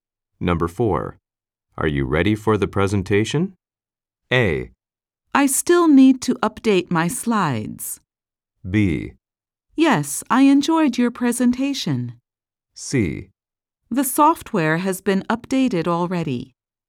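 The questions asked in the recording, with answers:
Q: Are you ready for the presentation?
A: A: I still need to update my slides.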